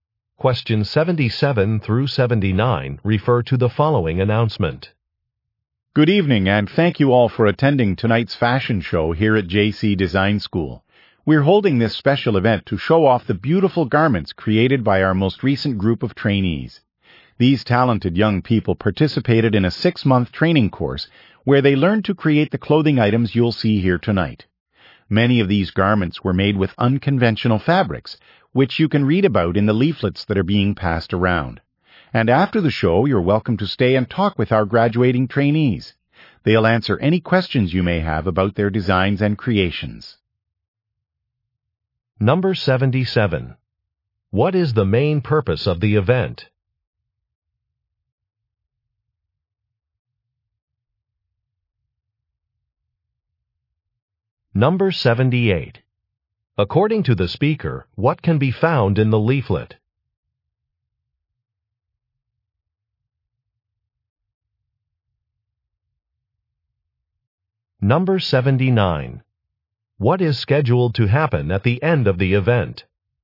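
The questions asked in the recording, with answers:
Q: What is the main purpose of the event?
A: To show off garments made by recent trainees

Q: According to the speaker, what can be found in the leaflet?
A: Information about the unconventional fabrics

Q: What is scheduled to happen at the end of the event?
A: Guests can talk with the graduating trainees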